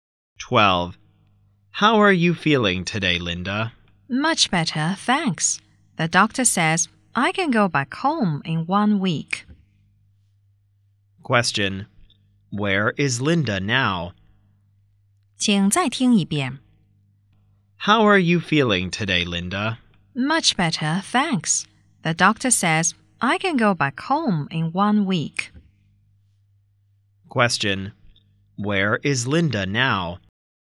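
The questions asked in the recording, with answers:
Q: Where is Linda now?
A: In hospital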